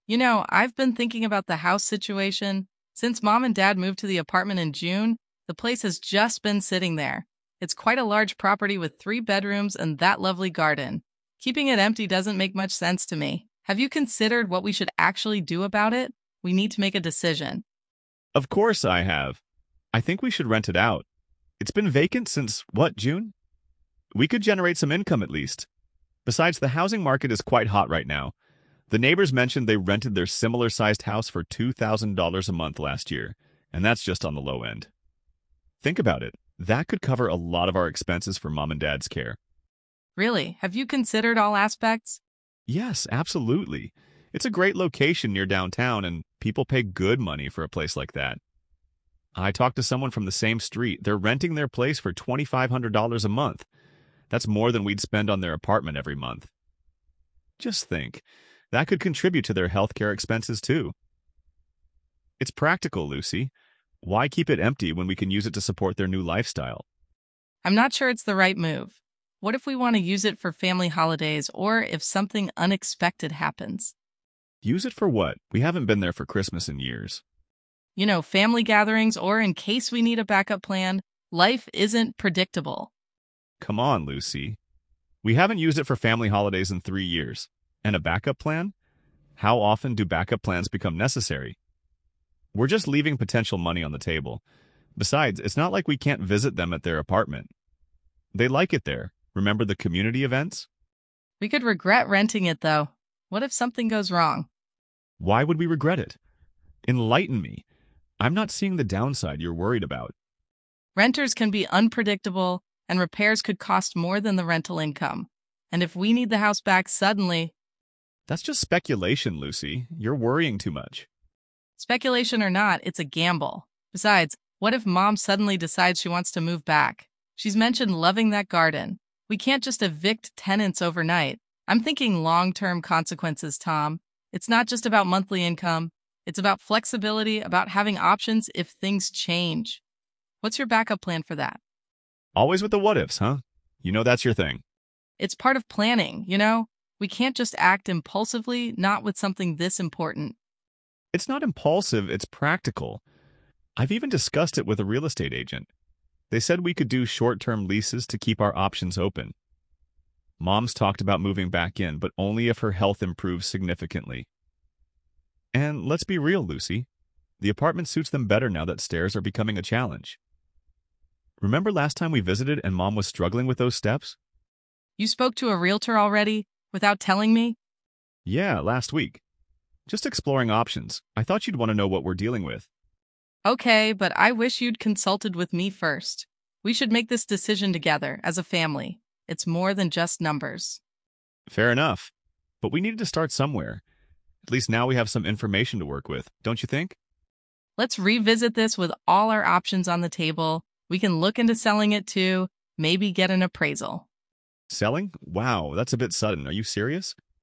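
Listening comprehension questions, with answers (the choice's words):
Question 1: What is the main topic of the conversation?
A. The house's current state and future use.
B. The logistics of Mom and Dad's current living situation.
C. The possibility of selling the house.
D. Lucy and Tom's family holiday plans.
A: The house's current state and future use.

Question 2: What is Tom's attitude towards renting out the house?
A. He is indifferent about what happens to the house.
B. He is enthusiastic about it because it can generate income.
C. He is frustrated by Lucy's what-if scenarios.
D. He is concerned about potential renter issues.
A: He is enthusiastic about it because it can generate income.

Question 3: According to Tom, what is one advantage of renting out the house?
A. It can be used for family holidays.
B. Rental income could help cover Mom and Dad's expenses.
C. It is located near downtown, increasing its rental value.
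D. The house has a lovely garden.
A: Rental income could help cover Mom and Dad's expenses.

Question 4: What inference can be made about Lucy's concerns?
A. She is unsure about how renting will affect family dynamics.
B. She is worried about the long-term flexibility and having options.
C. She is confident in handling unexpected events.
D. She thinks Mom will want to move back immediately.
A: She is worried about the long-term flexibility and having options.

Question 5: What does Lucy mean by 'speculation or not, it's a gamble'?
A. She is aware of the unpredictable nature of renters.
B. She is dismissing the idea of renting entirely.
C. She thinks Tom is acting without any real information.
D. She is highlighting the uncertainty involved in renting the house.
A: She is highlighting the uncertainty involved in renting the house.

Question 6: What is Lucy's reaction to Tom speaking with the realtor?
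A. She feels excluded from the decision-making process.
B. She is relieved to have professional input.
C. She insists on considering all options before deciding.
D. She is impressed by Tom's initiative.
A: She feels excluded from the decision-making process.

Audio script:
Lucy: You know, I've been thinking about the house situation. Since Mom and Dad moved to the apartment in June, the place has just been sitting there. It's quite a large property with three bedrooms and that lovely garden. Keeping it empty doesn't make much sense to me. Have you considered what we should actually do about it? We need to make a decision.
Tom: Of course, I have. I think we should rent it out. It's been vacant since, what, June? We could generate some income at least. Besides, the housing market is quite hot right now. The neighbors mentioned they rented their similar-sized house for $2,000 a month last year, and that's just on the low end. 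Think about it, that could cover a lot of our expenses for Mom and Dad's care.
Lucy: Really? Have you considered all aspects?
Tom: Yes, absolutely. It's a great location near downtown, and people pay good money for a place like that. I talked to someone from the same street; they're renting their place for $2,500 a month. That's more than we'd spend on their apartment every month. Just think, that could contribute to their healthcare expenses too. It's practical, Lucy. Why keep it empty when we can use it to support their new lifestyle?
Lucy: I'm not sure it's the right move. What if we want to use it for family holidays or if something unexpected happens?
Tom: Use it for what? We haven't been there for Christmas in years.
Lucy: You know, family gatherings or in case we need a backup plan. Life isn't predictable.
Tom: Come on, Lucy. We haven't used it for family holidays in three years. 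How often do backup plans become necessary? We're just leaving potential money on the table. Besides, it's not like we can't visit them at their apartment. They like it there, remember the community events?
Lucy: We could regret renting it, though. What if something goes wrong?
Tom: Why would we regret it? Enlighten me. I'm not seeing the downside you're worried about.
Lucy: Renters can be unpredictable, and repairs could cost more than the rental income. And if we need the house back suddenly—
Tom: That's just speculation, Lucy. You're worrying too much.
Lucy: Speculation or not, it's a gamble. Besides, what if Mom suddenly decides she wants to move back? She's mentioned loving that garden. We can't just evict tenants overnight. I'm thinking long-term consequences, Tom. It's not just about monthly income; it's about flexibility, about having options if things change. What's your backup plan for that?
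Tom: Always with the what-ifs, huh? You know that's your thing.
Lucy: It's part of planning, you know? We can't just act impulsively, not with something this important.
Tom: It's not impulsive, it's practical. I've even discussed it with a real estate agent. They said we could do short-term leases to keep our options open. Mom's talked about moving back in, but only if her health improves significantly. And let's be real, Lucy; the apartment suits them better now that stairs are becoming a challenge. Remember last time we visited and Mom was struggling with those steps?
Lucy: You spoke to a realtor already? Without telling me?
Tom: Yeah, last week. Just exploring options. I thought you'd want to know what we're dealing with.
Lucy: Okay, but I wish you'd consulted with me first. We should make this decision together, as a family. It's more than just numbers.
Tom: Fair enough. But we needed to start somewhere. 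At least now we have some information to work with. Don't you think?
Lucy: Let's revisit this with all our options on the table. We can look into selling it too, maybe get an appraisal.

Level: C1 Advanced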